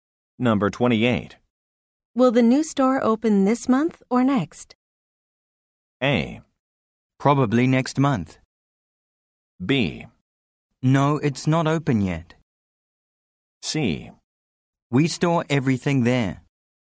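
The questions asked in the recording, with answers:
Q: Will the new store open this month or next?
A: A: Probably next month.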